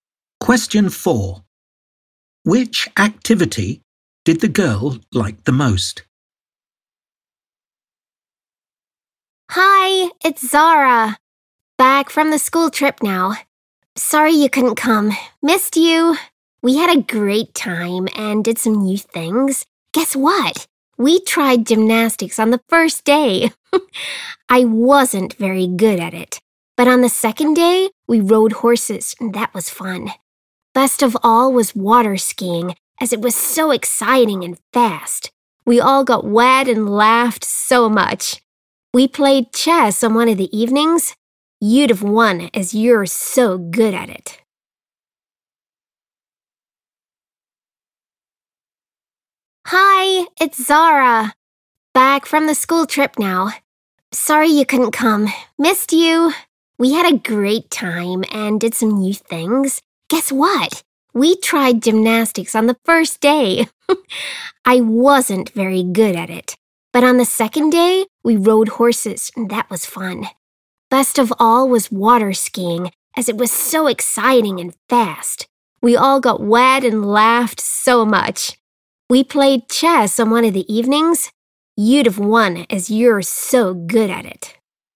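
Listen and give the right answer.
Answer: water skiing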